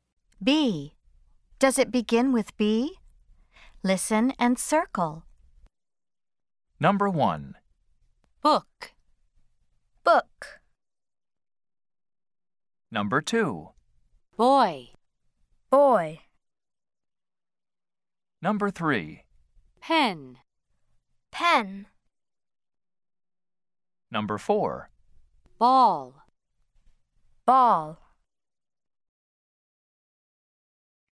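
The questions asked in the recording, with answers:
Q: Does it begin with B?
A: Yes (book)

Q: Does it begin with B?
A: Yes (boy)

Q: Does it begin with B?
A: No (pen)

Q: Does it begin with B?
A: Yes (ball)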